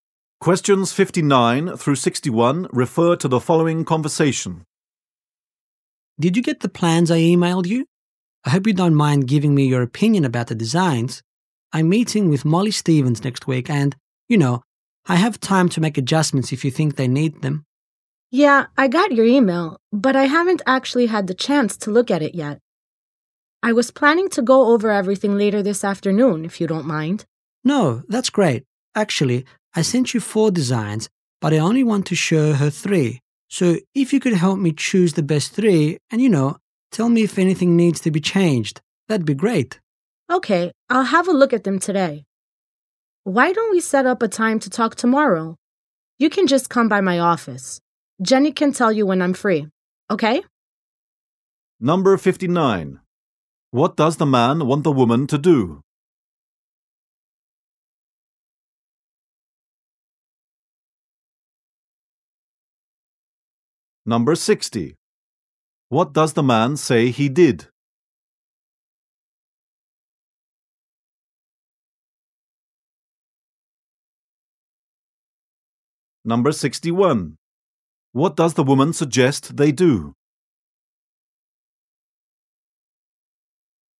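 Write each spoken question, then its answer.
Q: What does the man want the woman to do?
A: Review his designs and help him choose the best three.

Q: What does the man say he did?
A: He emailed her four designs.

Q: What does the woman suggest they do?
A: Meet in her office tomorrow to talk.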